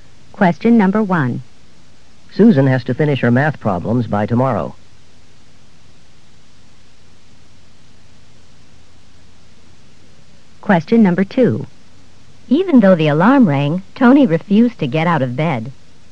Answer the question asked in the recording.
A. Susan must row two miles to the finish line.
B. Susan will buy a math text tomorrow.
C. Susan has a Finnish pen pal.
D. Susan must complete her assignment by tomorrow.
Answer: D. Susan must complete her assignment by tomorrow.

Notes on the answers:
Susan has to finish her math problems by tomorrow.